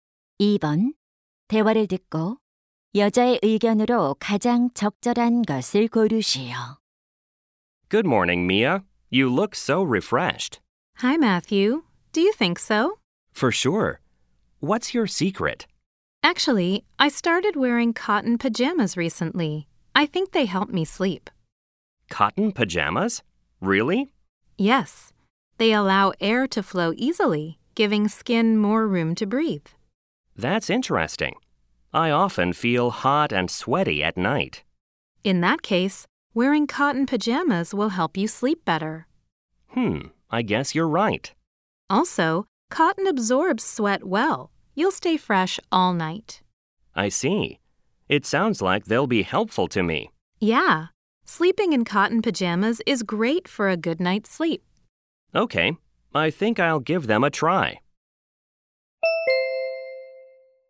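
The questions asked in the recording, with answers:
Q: 대화를 듣고 여자의 의견으로 가장 적절한 것을 고르시오.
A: 면 잠옷을 입고 자면 숙면에 도움이 된다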